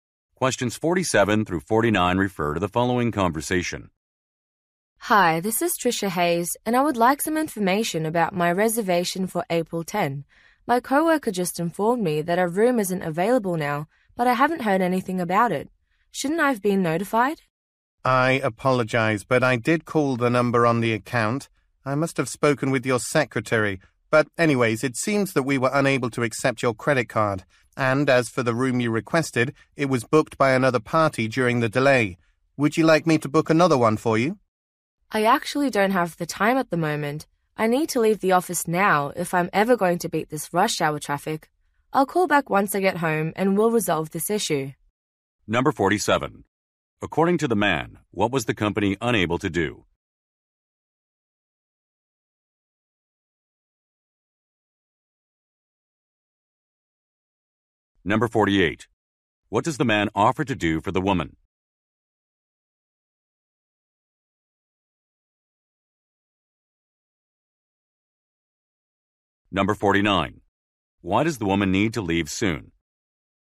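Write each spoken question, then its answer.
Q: According to the man, what was the company unable to do?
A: Accept her credit card

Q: What does the man offer to do for the woman?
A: Book another room

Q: Why does the woman need to leave soon?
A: To beat rush hour traffic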